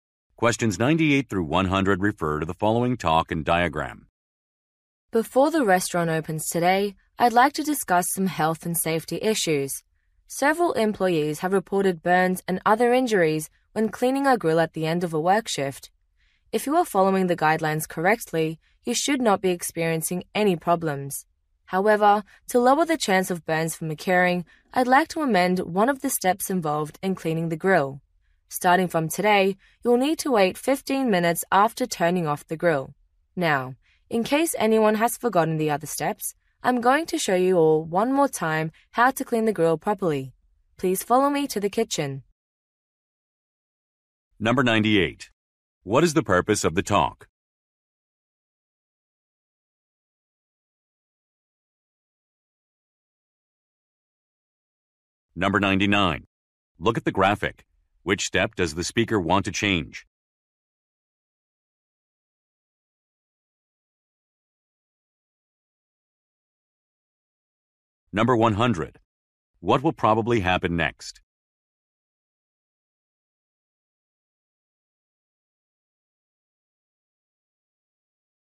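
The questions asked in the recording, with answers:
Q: What is the purpose of the talk?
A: To explain a change to the grill-cleaning procedure for safety

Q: What will probably happen next?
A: The speaker will show how to clean the grill in the kitchen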